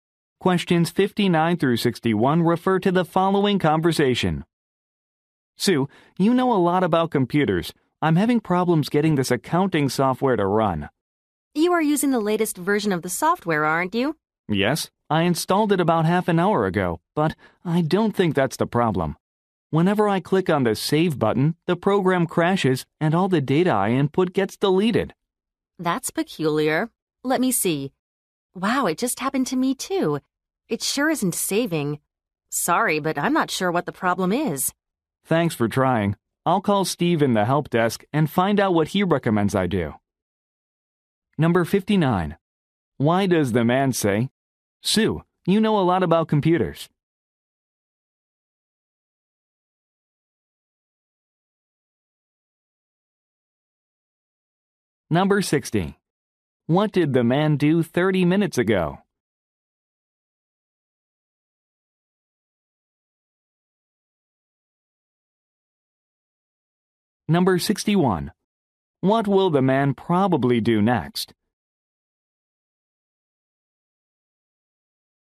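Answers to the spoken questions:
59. He wants her help with a software problem
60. Installed the accounting software
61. Call Steve at the help desk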